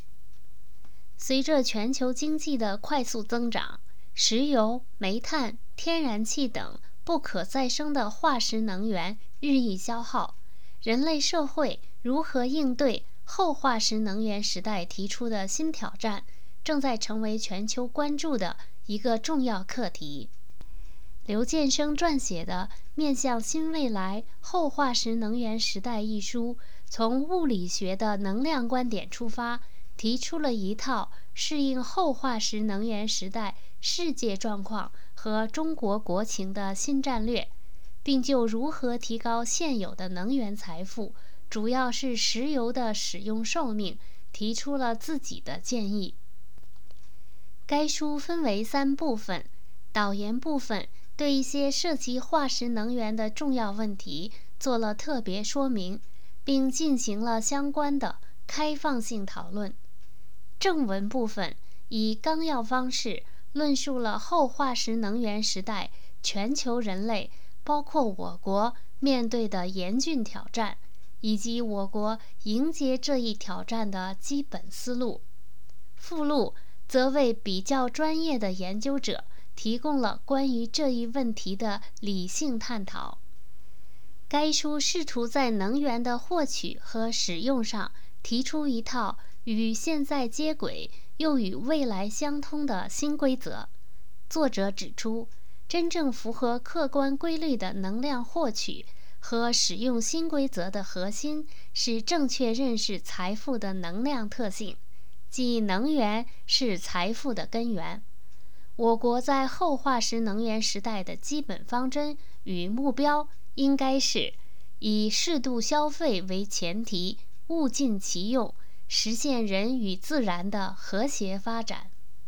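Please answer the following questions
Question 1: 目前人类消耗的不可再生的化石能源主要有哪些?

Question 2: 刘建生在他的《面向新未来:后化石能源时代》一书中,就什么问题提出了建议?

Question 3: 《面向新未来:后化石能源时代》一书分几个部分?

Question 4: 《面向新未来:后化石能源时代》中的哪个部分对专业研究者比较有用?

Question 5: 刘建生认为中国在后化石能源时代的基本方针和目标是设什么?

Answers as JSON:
{"1": "石油、煤炭、天然气", "2": "如何提高现有的能源财富(主要是石油)的使用寿命", "3": "三部分:导言、正文、附录", "4": "附录", "5": "以适度消费为前提,物尽其用,实现人与自然的和谐发展"}

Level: 3rd Year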